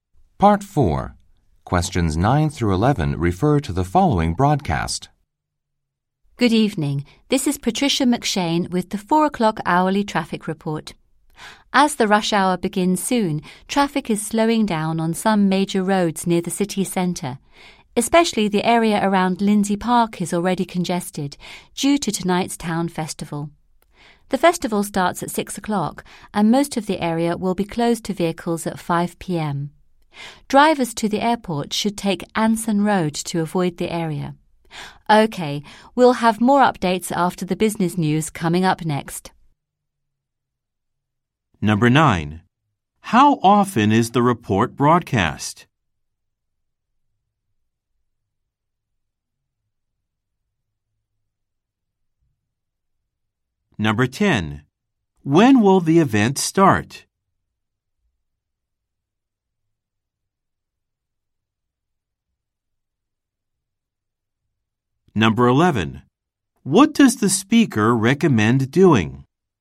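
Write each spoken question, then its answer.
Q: How often is the report broadcast?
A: Every hour

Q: When will the event start?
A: At 6 o'clock

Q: What does the speaker recommend doing?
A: Taking Anson Road to the airport to avoid the festival area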